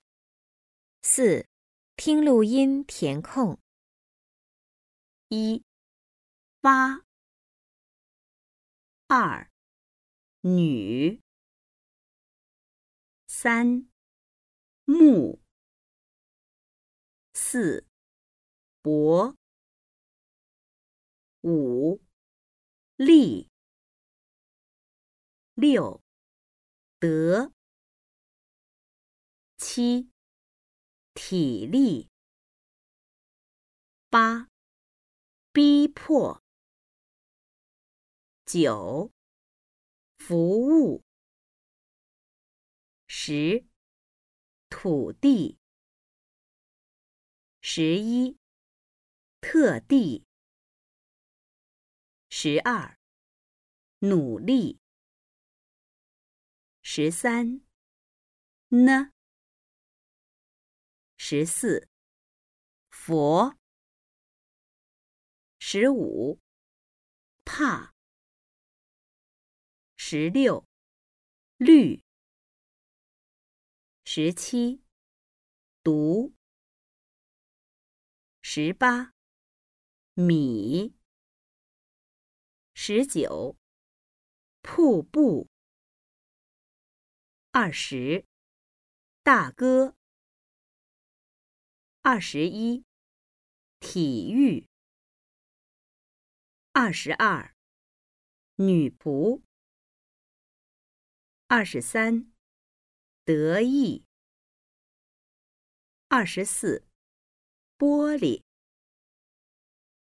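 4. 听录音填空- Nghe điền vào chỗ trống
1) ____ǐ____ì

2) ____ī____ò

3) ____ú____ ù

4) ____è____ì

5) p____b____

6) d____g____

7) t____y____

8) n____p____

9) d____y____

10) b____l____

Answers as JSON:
{"1": "t, l", "2": "b, p", "3": "f, w", "4": "t, d", "5": "ù, ù", "6": "à, ē", "7": "ǐ, ù", "8": "ǚ, ú", "9": "é, ì", "10": "ō, i"}

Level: Sơ Cấp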